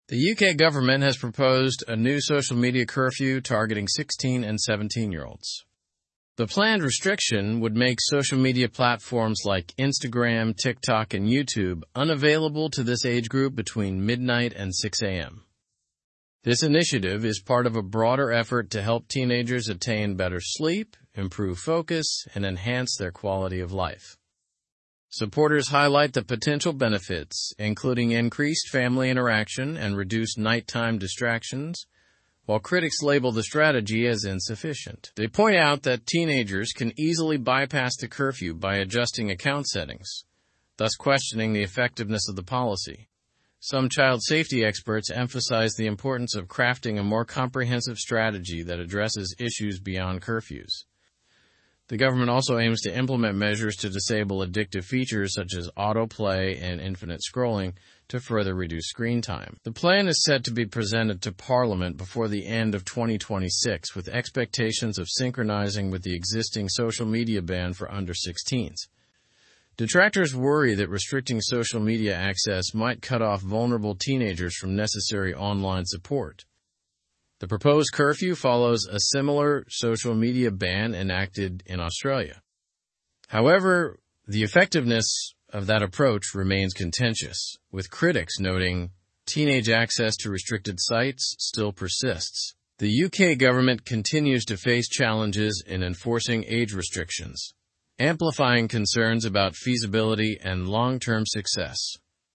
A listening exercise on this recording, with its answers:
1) What age group is the UK government's social media curfew targeting?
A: The curfew targets 16 and 17-year-olds.

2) What time will the curfew restrict access to social media?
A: The curfew will restrict social media access from midnight to 6 am.

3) What are some expected benefits of the curfew mentioned in the article?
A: Expected benefits include better sleep, improved focus, and enhanced quality of life.

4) What are critics concerned about regarding the curfew's effectiveness?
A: Critics are concerned that teenagers can bypass the curfew by adjusting account settings.

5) What additional government measure is mentioned to further reduce screen time?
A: Disabling features like auto-play and infinite scrolling is mentioned to reduce screen time.

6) By when is the government's plan expected to be presented to Parliament?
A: The plan is expected to be presented before the end of

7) What similarities does the article mention between the UK and Australia?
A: Both countries have proposed or enacted social media bans for certain age groups.

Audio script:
The UK government has proposed a new social media curfew targeting 16 and 17-year-olds. The planned restriction would make social media platforms like Instagram, TikTok, and YouTube unavailable to this age group between midnight and 6 am. This initiative is part of a broader effort to help teenagers attain better sleep, improve focus, and enhance their quality of life.
Supporters highlight the potential benefits, including increased family interaction and reduced nighttime distractions, while critics label the strategy as insufficient. They point out that teenagers can easily bypass the curfew by adjusting account settings, thus questioning the effectiveness of the policy. Some child safety experts emphasize the importance of crafting a more comprehensive strategy that addresses issues beyond curfews.
The government also aims to implement measures to disable addictive features such as auto-play and infinite scrolling to further reduce screen time. The plan is set to be presented to Parliament before the end of 2026 with expectations of synchronizing with the existing social media ban for under-16s. Detractors worry that restricting social media access might cut off vulnerable teenagers from necessary online support.
The proposed curfew follows a similar social media ban enacted in Australia. However, the effectiveness of that approach remains contentious, with critics noting teenage access to restricted sites still persists. The UK government continues to face challenges in enforcing age restrictions, amplifying concerns about feasibility and long-term success.

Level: Level 3